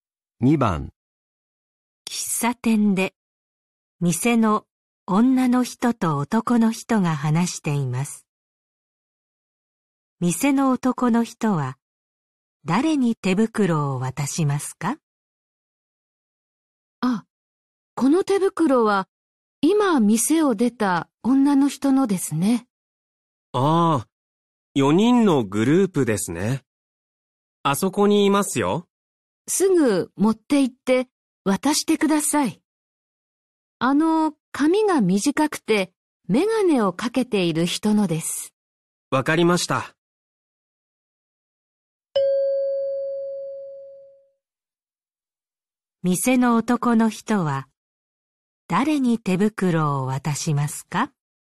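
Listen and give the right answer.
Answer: 髪が短くてメガネをかけている女の人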